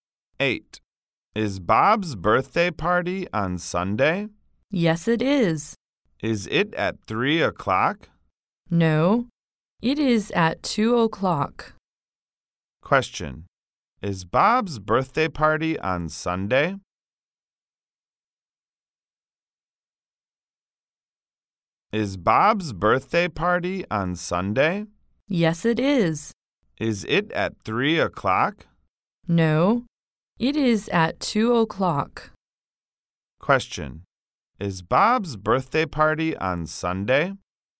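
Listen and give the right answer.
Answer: Yes, it is.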